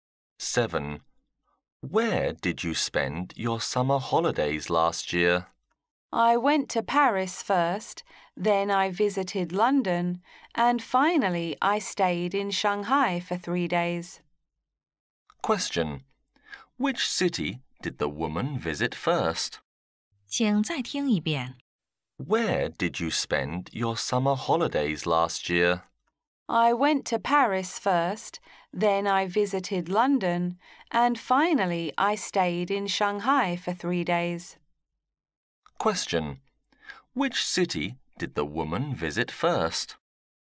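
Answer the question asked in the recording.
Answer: Paris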